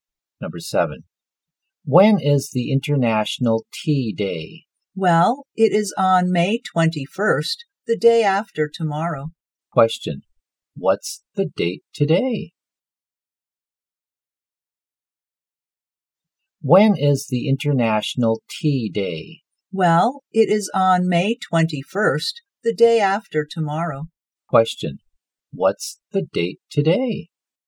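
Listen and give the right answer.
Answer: May 19th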